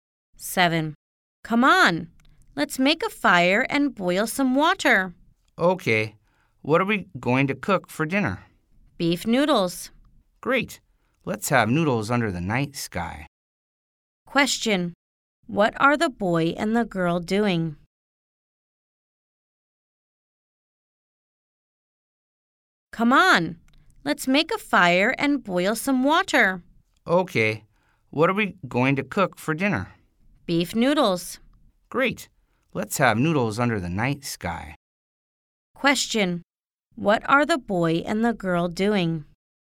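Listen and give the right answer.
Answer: Making a fire to cook beef noodles for dinner (camping)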